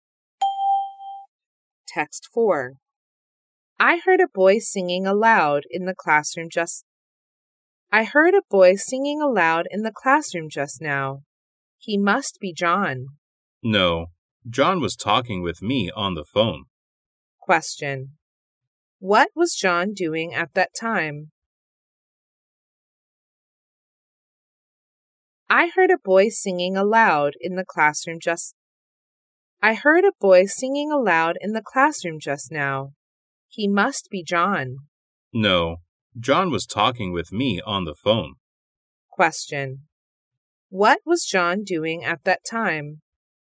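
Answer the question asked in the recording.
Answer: Talking on the phone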